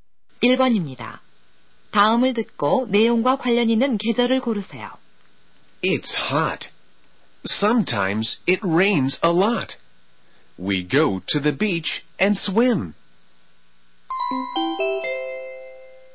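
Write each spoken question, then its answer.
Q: 다음을 듣고 내용과 관련 있는 계절을 고르세요.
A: 여름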